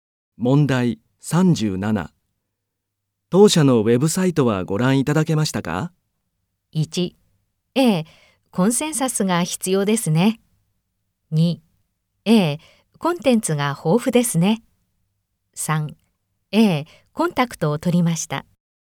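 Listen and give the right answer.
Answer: 2: ええ、コンテンツが豊富ですね。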